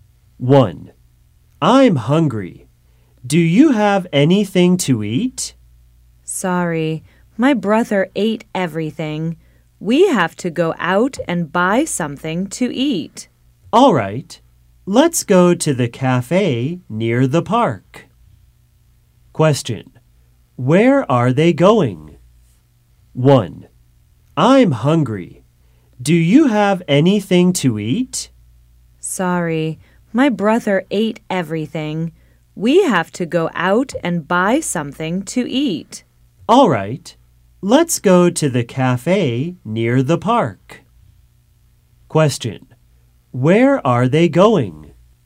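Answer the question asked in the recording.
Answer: To the cafe near the park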